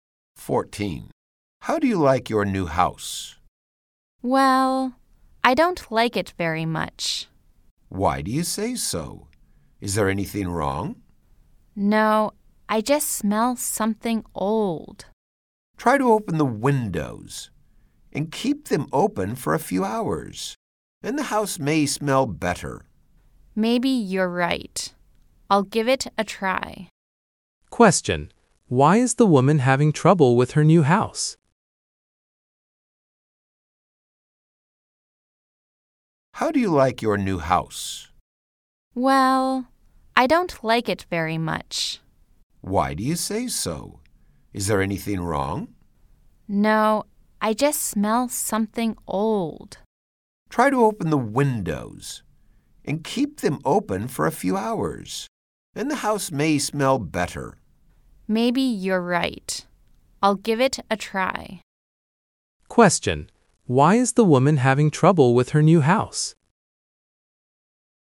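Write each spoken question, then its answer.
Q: Question. Why is the woman having trouble with her new house?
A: It smells old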